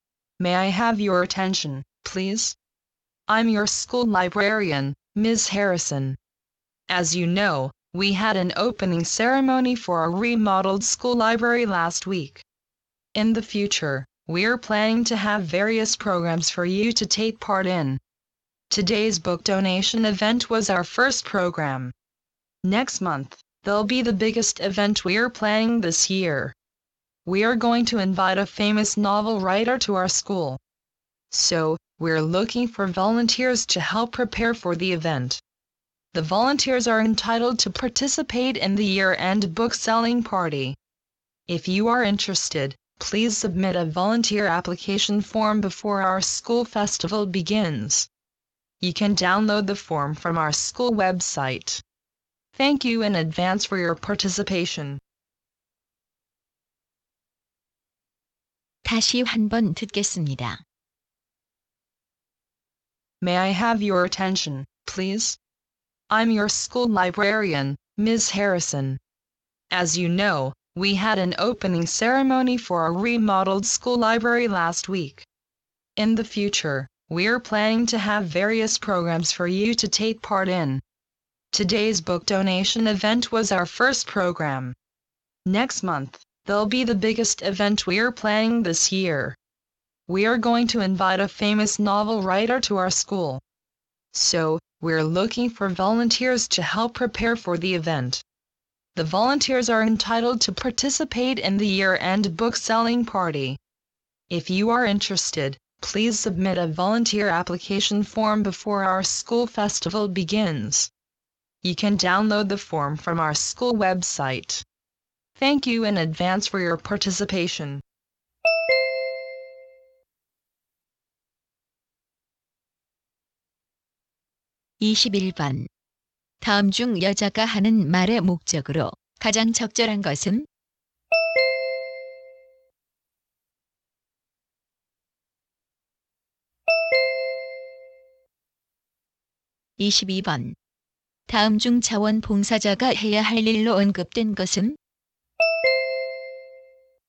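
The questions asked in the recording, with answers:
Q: 다음 중 여자가 하는 말의 목적으로 가장 적절한 것은?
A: 도서관 행사를 도울 자원봉사자를 모집하려고

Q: 다음 중 자원봉사자가 해야 할 일로 언급된 것은?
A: 유명 소설가 초청 행사 준비 돕기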